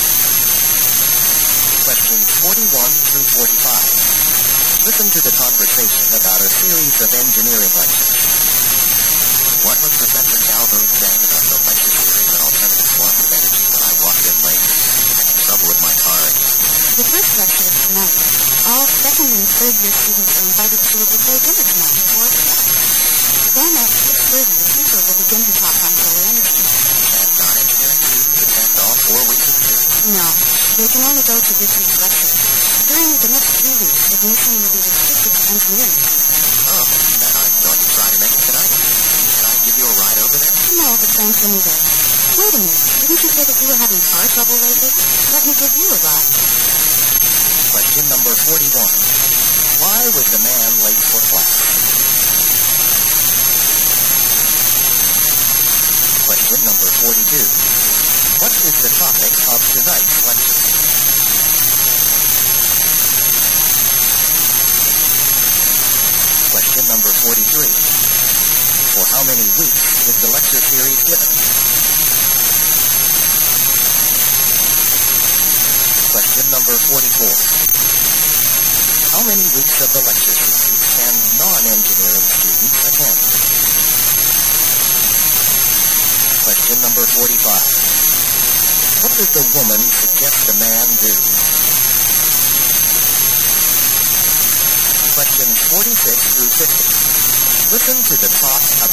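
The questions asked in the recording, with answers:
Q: Why was the man late for class?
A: He had car trouble

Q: What is the topic of tonight's lecture?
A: Solar energy

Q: For how many weeks is the lecture series given?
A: Four weeks

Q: How many weeks of the lecture series can non-engineering students attend?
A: One week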